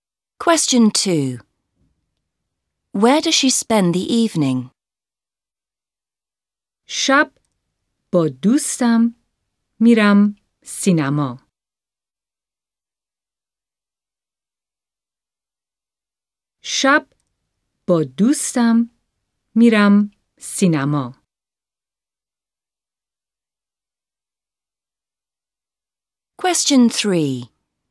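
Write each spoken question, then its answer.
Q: Where does she spend the evening?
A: At the cinema with her friend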